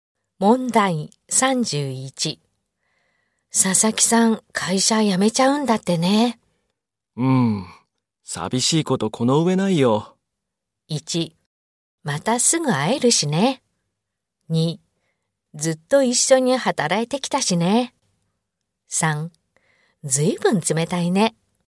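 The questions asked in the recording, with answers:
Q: 佐々木さん、会社辞めちゃうんだってね。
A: 2: ずっと一緒に働いてきたしね。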